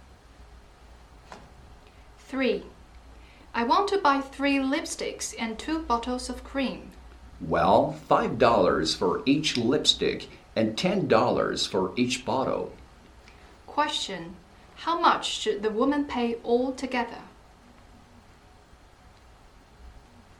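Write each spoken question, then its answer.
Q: Question, how much should the woman pay all together?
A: $35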